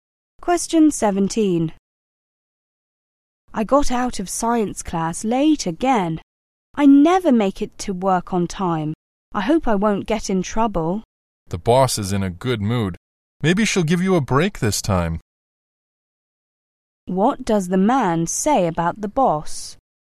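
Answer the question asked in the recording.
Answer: She is in a good mood, so she may let the woman off this time.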